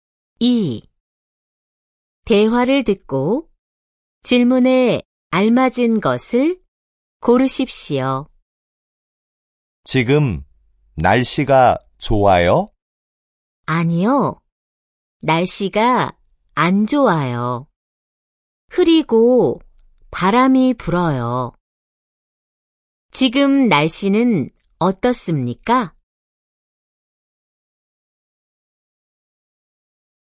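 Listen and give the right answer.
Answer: 흐리고 바람이 불어요.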